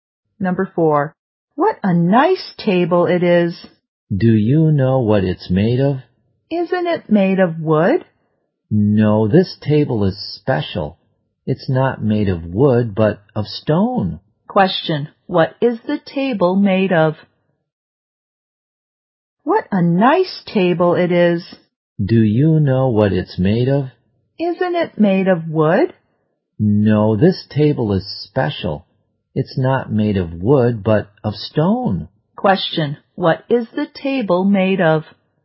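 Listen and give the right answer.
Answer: Stone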